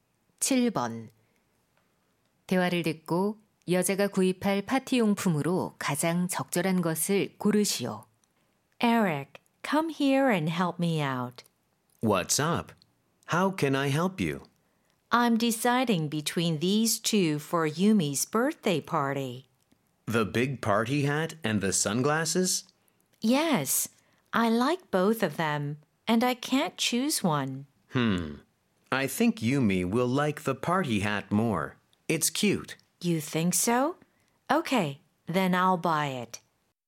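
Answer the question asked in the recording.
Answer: 파티 모자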